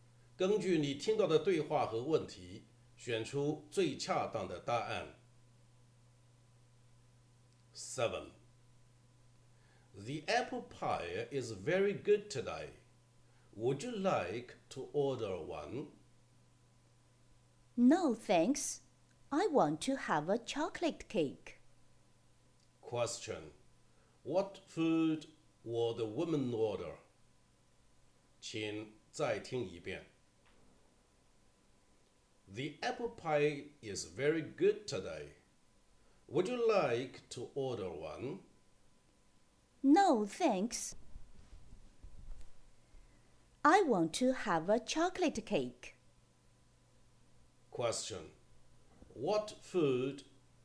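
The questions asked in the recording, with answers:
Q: What food will the woman order?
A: A chocolate cake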